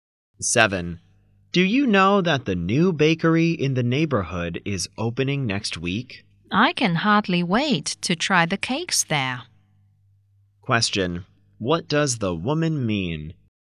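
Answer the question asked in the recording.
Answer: She is eager to try the cakes at the new bakery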